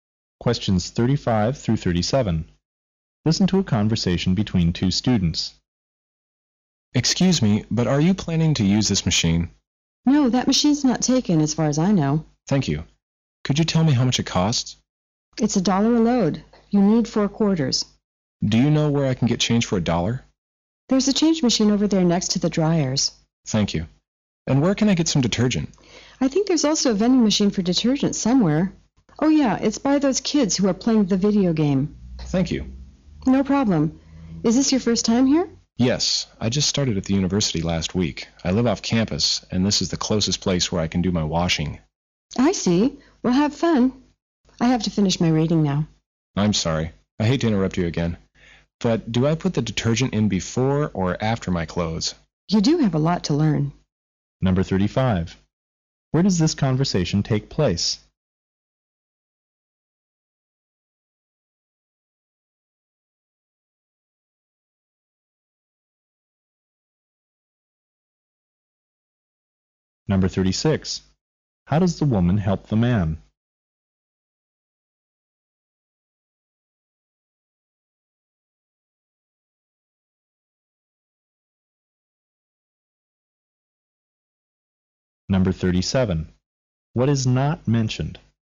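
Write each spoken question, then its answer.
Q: Where does this conversation take place?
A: In a laundromat

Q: How does the woman help the man?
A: She tells him how much the machine costs and where to get change and detergent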